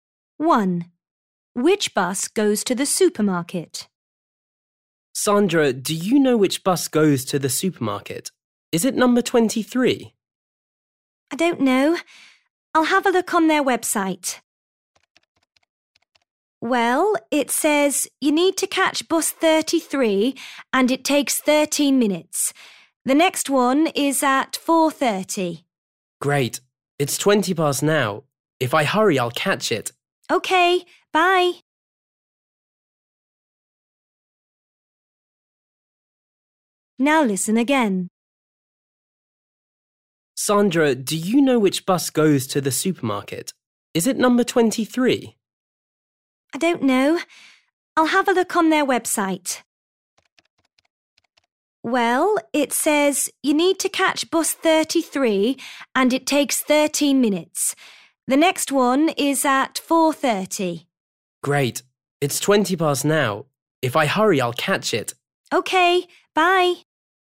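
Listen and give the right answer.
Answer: Bus 33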